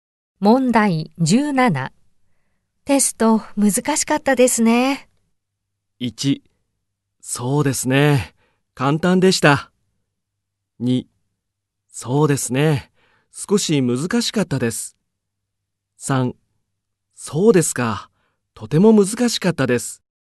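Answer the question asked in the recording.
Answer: 2: そうですね。少し難しかったです。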